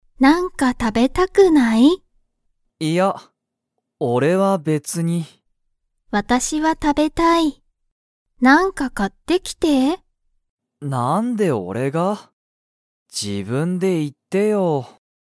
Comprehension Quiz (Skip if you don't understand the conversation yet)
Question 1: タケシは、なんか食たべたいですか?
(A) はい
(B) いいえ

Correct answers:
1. B

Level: Level 1

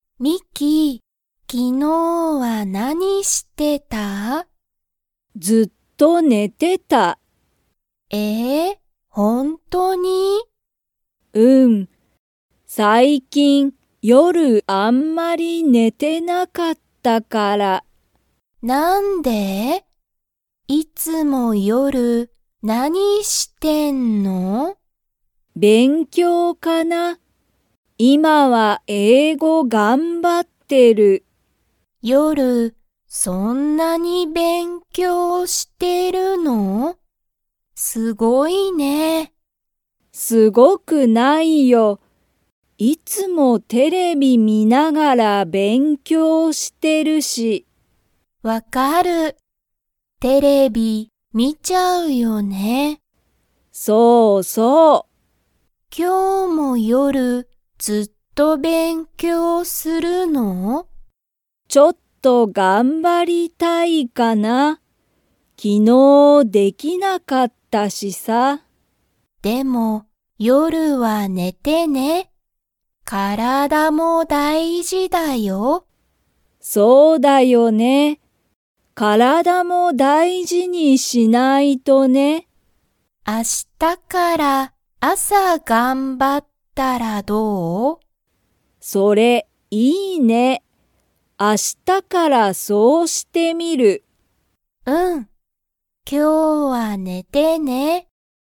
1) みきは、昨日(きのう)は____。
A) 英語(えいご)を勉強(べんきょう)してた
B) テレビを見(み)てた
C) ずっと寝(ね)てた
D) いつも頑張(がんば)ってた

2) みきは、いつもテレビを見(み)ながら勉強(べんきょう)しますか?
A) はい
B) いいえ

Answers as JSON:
{"1": "C", "2": "A"}

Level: Level 2

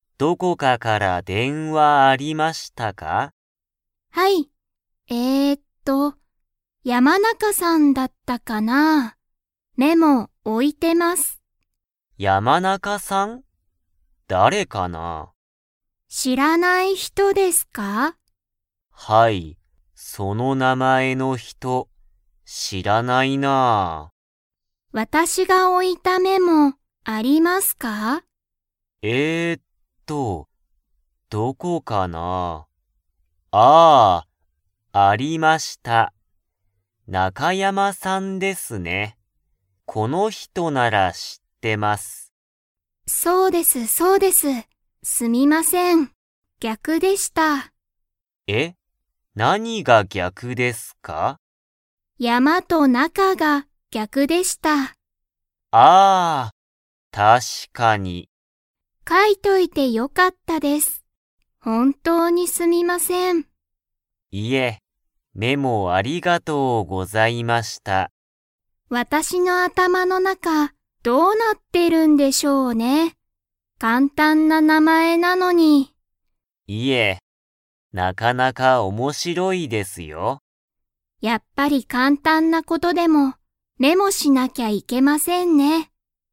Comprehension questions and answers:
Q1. 佐藤(さとう)さんに、____から電話(でんわ)あった。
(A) 山中(やまなか)さん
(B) 中山(なかやま)さん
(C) 田中(たなか)さん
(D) 中田(なかた)さん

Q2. 田中(たなか)さんは、電話(でんわ)の時(とき)、メモしましたか?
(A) はい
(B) いいえ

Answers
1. B
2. A

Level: Level 2

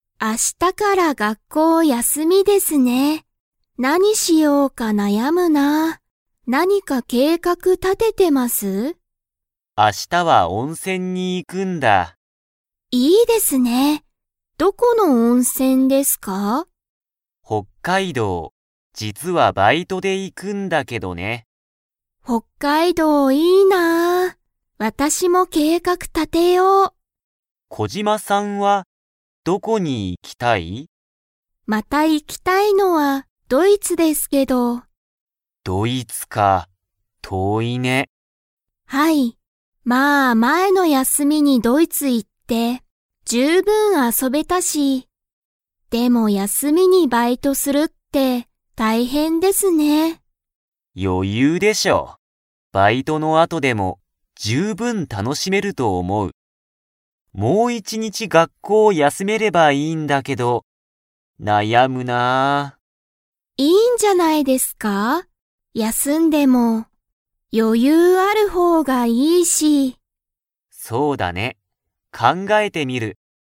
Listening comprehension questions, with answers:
Comprehension Quiz (Skip if you don't understand the conversation yet)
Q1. ウエダさんは、休やすみにどこへ行いきますか?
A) 北海道ほっかいどう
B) ドイツ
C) 計画けいかく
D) 学校がっこう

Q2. コジマさんには、休やすみの計画けいかくが 。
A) ある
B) ない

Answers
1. A
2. B

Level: Level 4

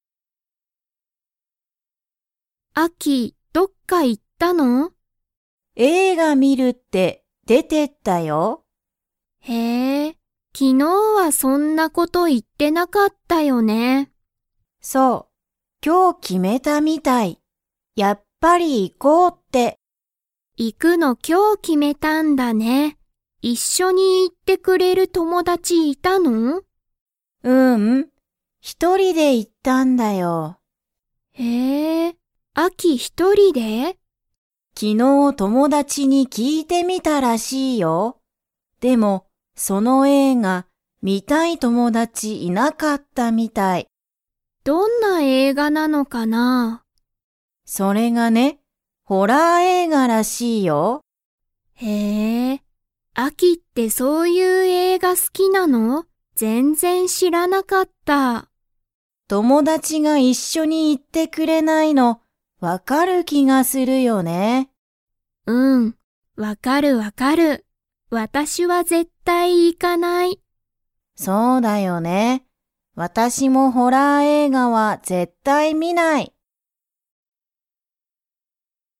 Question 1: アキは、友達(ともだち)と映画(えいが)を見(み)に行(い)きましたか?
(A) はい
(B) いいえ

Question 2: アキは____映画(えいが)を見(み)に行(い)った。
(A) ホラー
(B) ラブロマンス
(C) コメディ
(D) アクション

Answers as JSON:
{"1": "B", "2": "A"}

